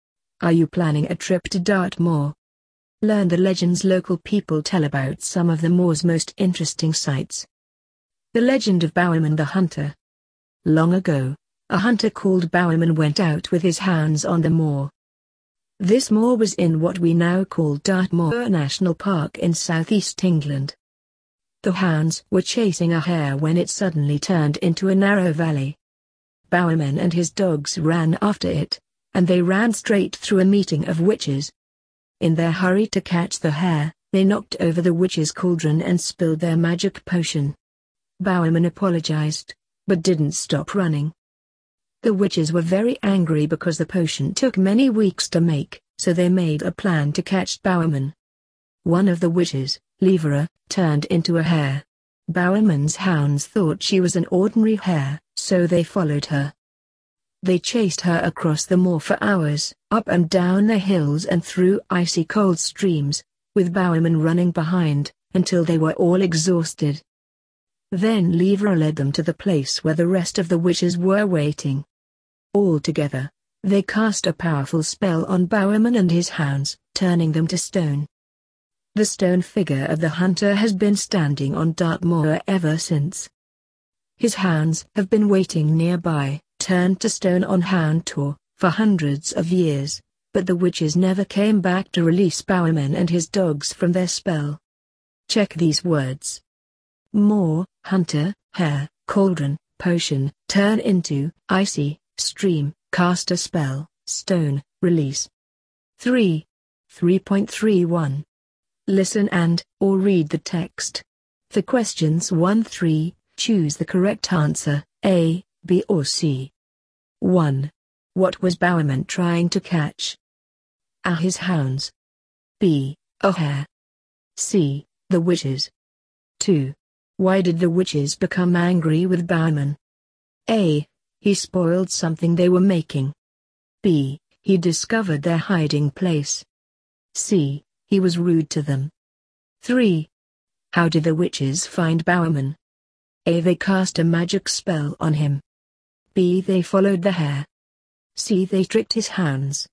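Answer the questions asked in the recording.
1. B: A hare.
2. A: He spoiled something they were making.
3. C: They tricked his hounds.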